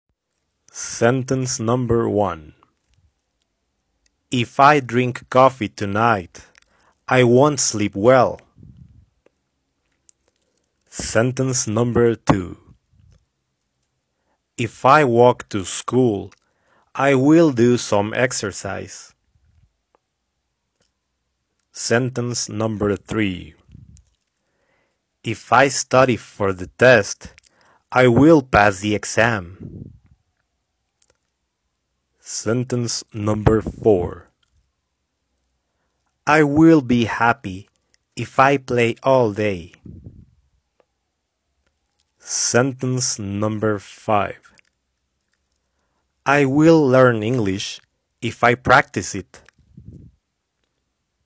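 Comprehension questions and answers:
Listen to the audio and complete the sentences with the missing verbs.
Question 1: If I Cloze (1): JXUwMDNjJXUwMDE2JXUwMDFiJXUwMDA3JXUwMDA1 coffee tonight, I won ́t Cloze (2): JXUwMDJiJXUwMDFmJXUwMDA5JXUwMDAwJXUwMDE1 well.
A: drink; sleep

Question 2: If I Cloze (3): JXUwMDJmJXUwMDE2JXUwMDBkJXUwMDA3 to school, I will Cloze (4): JXUwMDNjJXUwMDBi some exercise.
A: walk; do

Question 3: If I Cloze (5): JXUwMDJiJXUwMDA3JXUwMDAxJXUwMDExJXUwMDFk for the test, I will Cloze (6): JXUwMDI4JXUwMDExJXUwMDEyJXUwMDAw the exam.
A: study; pass

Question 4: I will Cloze (7): JXUwMDNhJXUwMDA3 happy, if I Cloze (8): JXUwMDI4JXUwMDFjJXUwMDBkJXUwMDE4 all day.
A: be; play

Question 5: I will Cloze (9): JXUwMDM0JXUwMDA5JXUwMDA0JXUwMDEzJXUwMDFj English, if I Cloze (10): JXUwMDI4JXUwMDAyJXUwMDEzJXUwMDAyJXUwMDE3JXUwMDFkJXUwMDBhJXUwMDA2 it.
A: learn; practice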